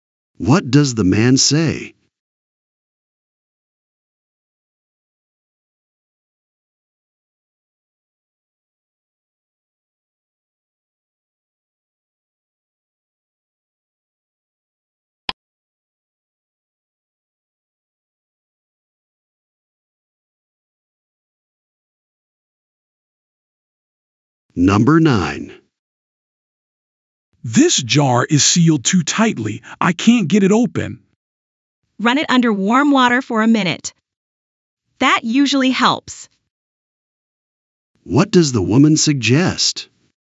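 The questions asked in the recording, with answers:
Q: What does the woman suggest?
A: Running the jar under warm water.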